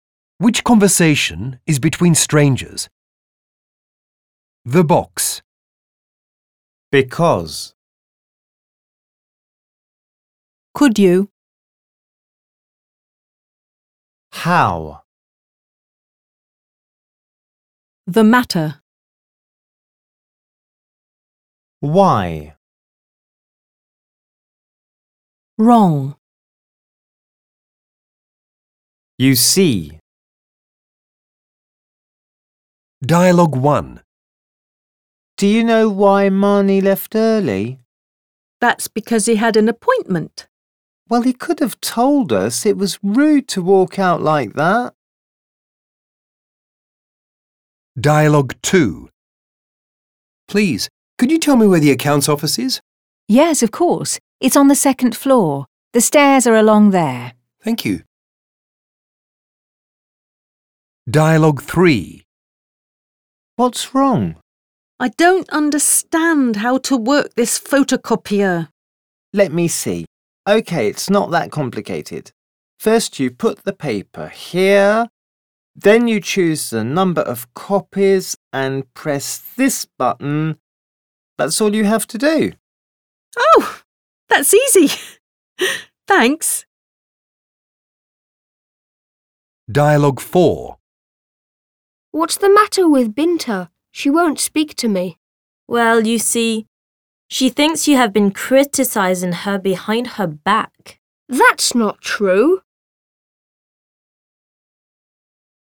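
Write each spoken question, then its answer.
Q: Which conversation is between strangers?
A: Dialogue 2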